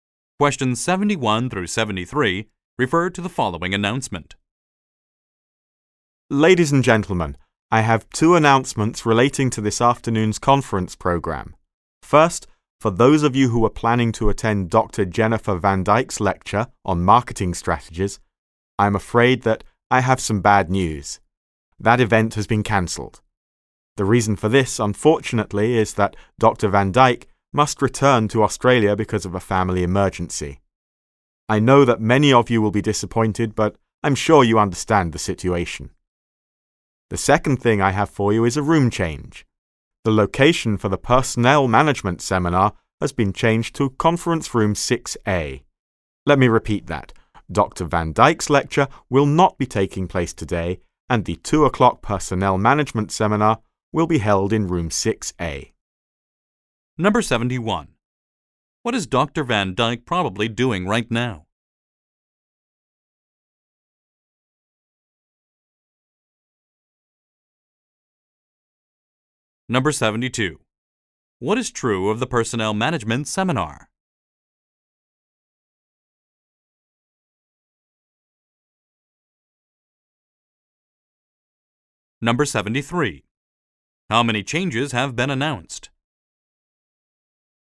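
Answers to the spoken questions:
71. Returning to Australia because of a family emergency
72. It has been moved to Conference Room 6A
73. Two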